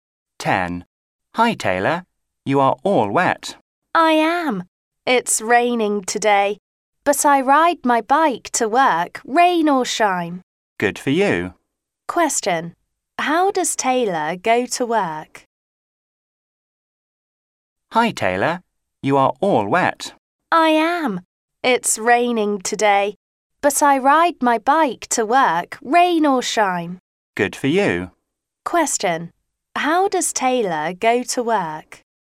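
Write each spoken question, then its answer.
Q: How does Taylor go to work?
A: By bike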